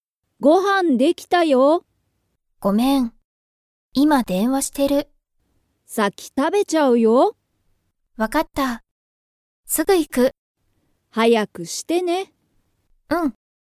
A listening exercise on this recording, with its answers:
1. なおこは、今(いま)、ご飯(はん)を食(た)べていますか?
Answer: いいえ)

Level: Level 1